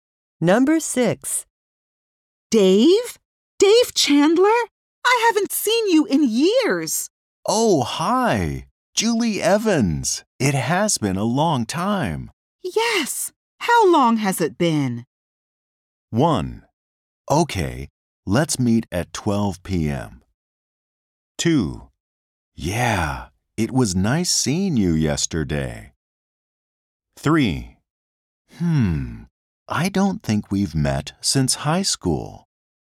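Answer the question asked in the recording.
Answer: 3: I don't think we've met since high school.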